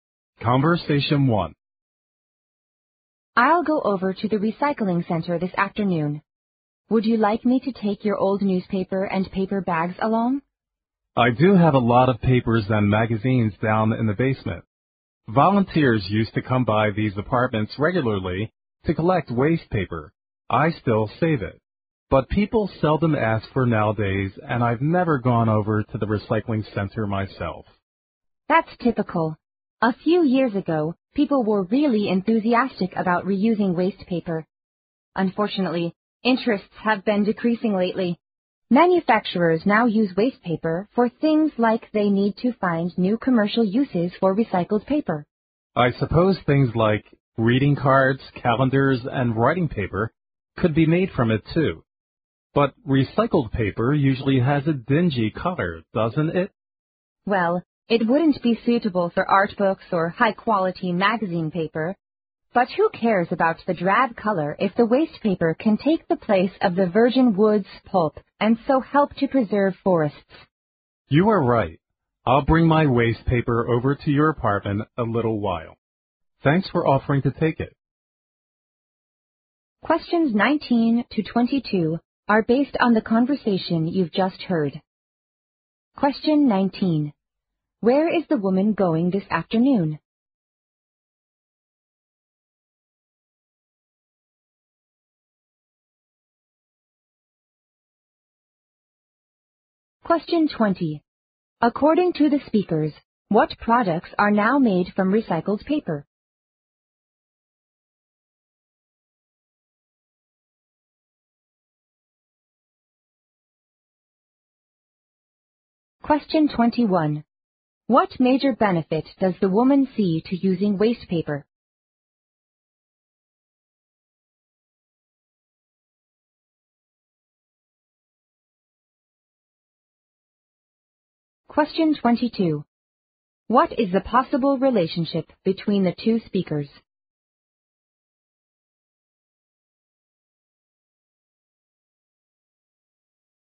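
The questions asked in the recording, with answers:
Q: Where is the woman going this afternoon?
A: To the recycling center

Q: What major benefit does the woman see to using waste paper?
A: It helps preserve forests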